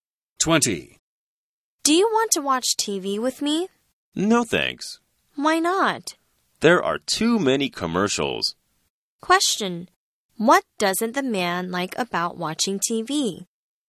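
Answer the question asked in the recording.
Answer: There are too many commercials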